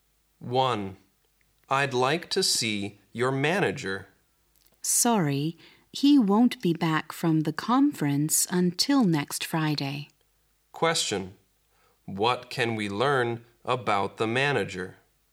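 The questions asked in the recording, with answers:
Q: What can we learn about the manager?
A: He is at a conference and won't be back until next Friday.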